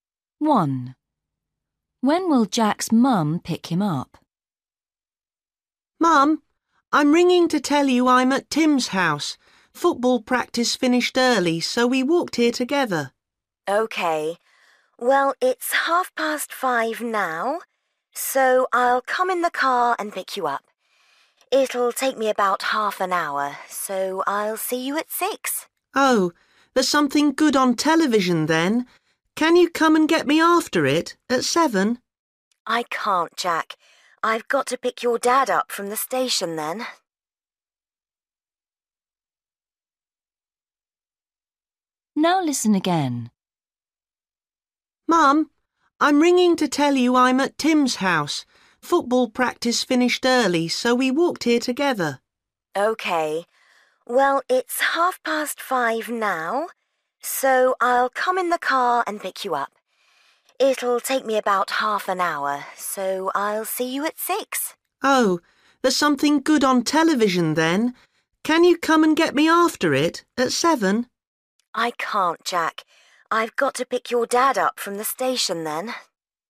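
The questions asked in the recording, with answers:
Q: When will Jack's mum pick him up?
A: At 6 o'clock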